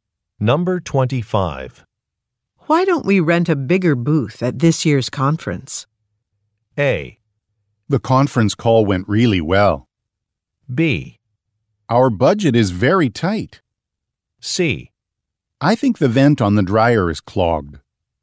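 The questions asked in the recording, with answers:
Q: Why don't we rent a bigger booth at this year's conference?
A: B: Our budget is very tight.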